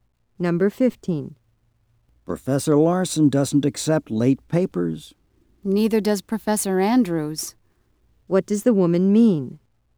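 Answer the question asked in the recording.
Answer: Professor Andrews doesn't accept late papers either.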